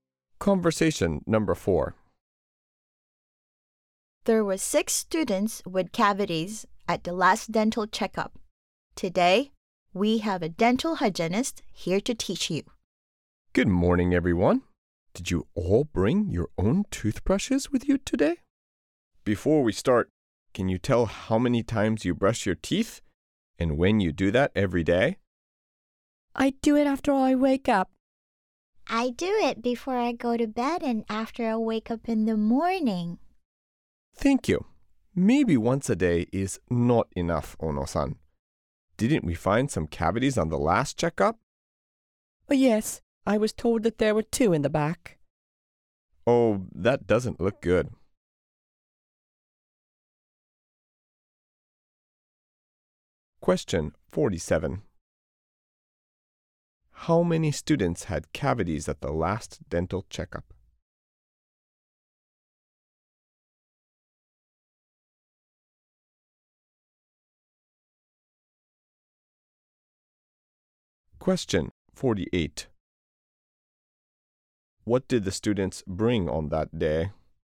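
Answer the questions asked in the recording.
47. Six
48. Their own toothbrushes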